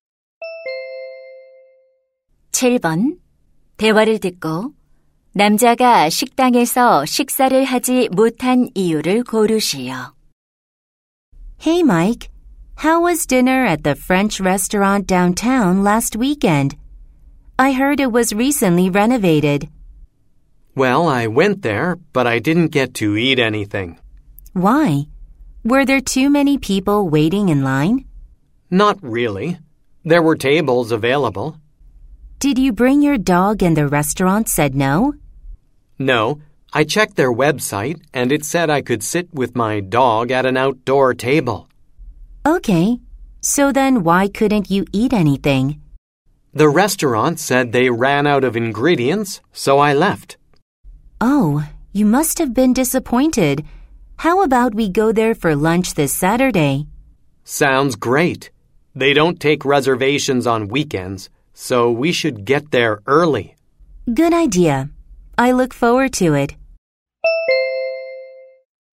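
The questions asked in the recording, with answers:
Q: 대화를 듣고 남자가 식당에서 식사를 하지 못한 이유를 고르시오.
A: 식당의 재료가 다 떨어져서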